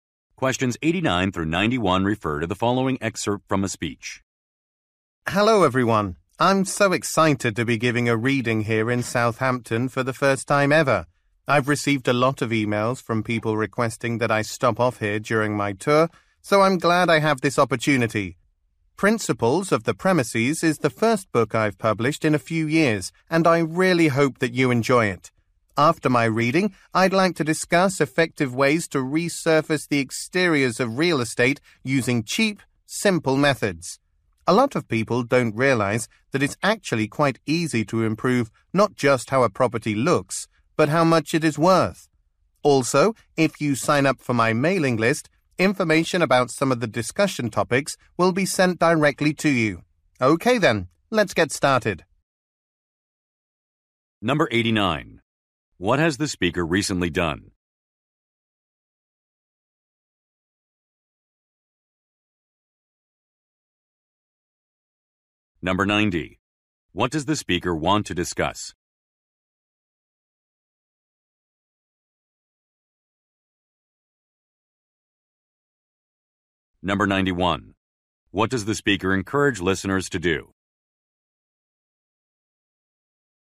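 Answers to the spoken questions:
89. Published a book
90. Cheap, simple ways to resurface property exteriors
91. Sign up for the mailing list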